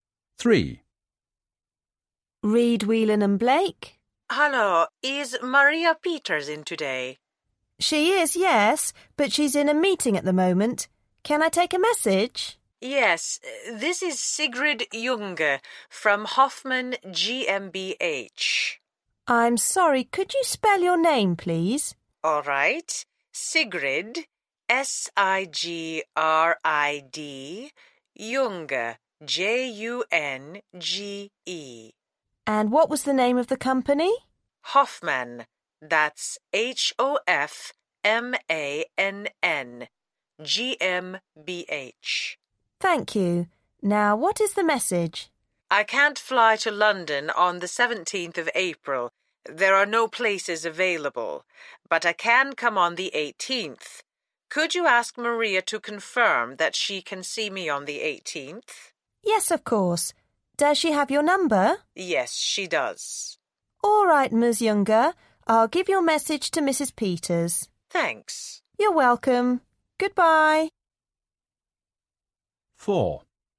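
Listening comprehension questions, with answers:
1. Where is Maria Peters at the moment?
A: In a meeting

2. What's the customer's name?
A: Sigrid Junge

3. What company is the customer from?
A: Hoffmann GmbH

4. What message would the customer like to leave?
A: She can't fly to London on 17th April but can come on the 18th; Maria should confirm she can see her on the 18th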